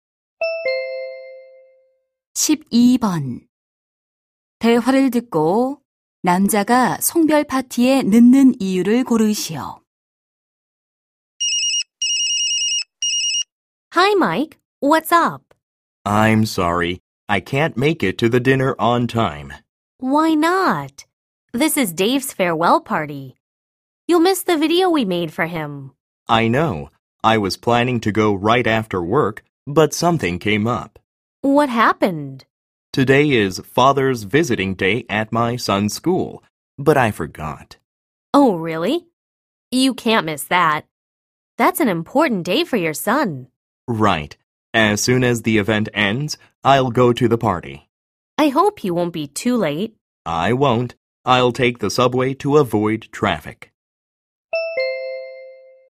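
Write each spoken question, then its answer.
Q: 대화를 듣고 남자가 송별 파티에 늦는 이유를 고르시오.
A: 아들 학교의 아버지 방문의 날 행사에 가야 해서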